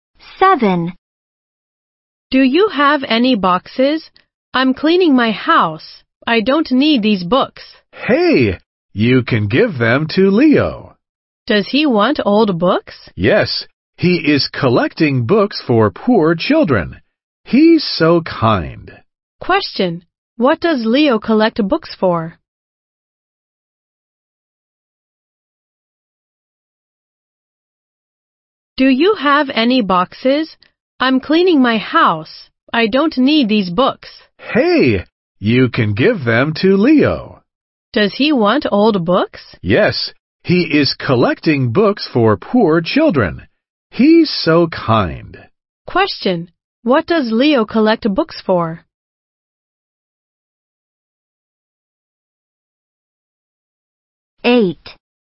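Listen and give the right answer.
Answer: For poor children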